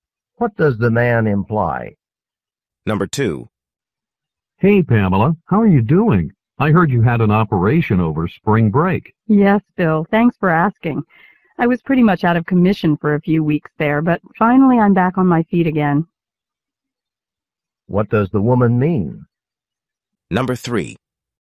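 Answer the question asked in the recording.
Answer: She has recovered from her operation.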